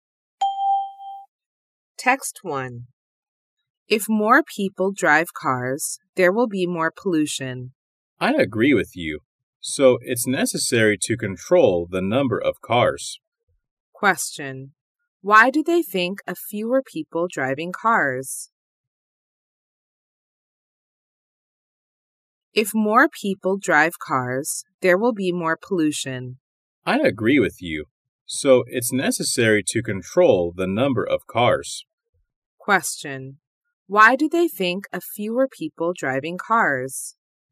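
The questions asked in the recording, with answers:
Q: Why do they think of fewer people driving cars?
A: Because more cars cause more pollution.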